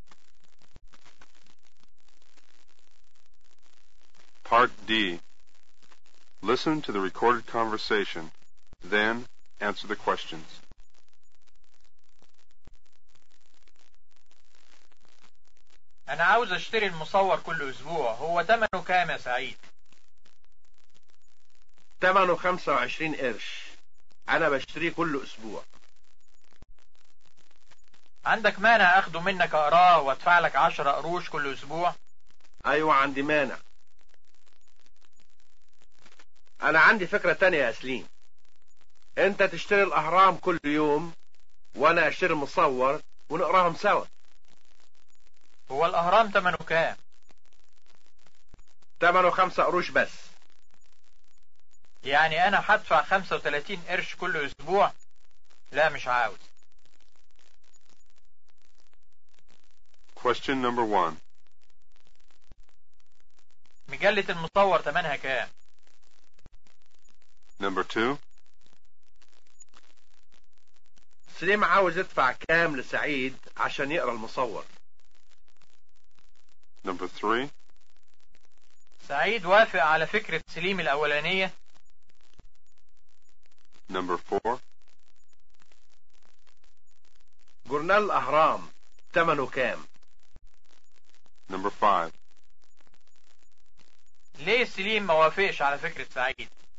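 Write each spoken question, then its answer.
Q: مجلة المصور تمنها كام؟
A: 25 قرش

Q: سليم عاوز يدفع كام لسعيد عشان يقرأ المصور؟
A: 10 قروش كل أسبوع

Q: سعيد وافق على فكرة سليم الأولانية؟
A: لا، عنده مانع

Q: جورنال الأهرام تمنه كام؟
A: 5 قروش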